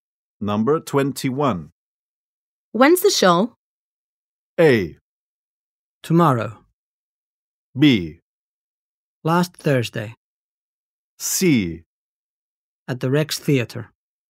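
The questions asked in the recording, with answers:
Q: When's the show?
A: A: Tomorrow.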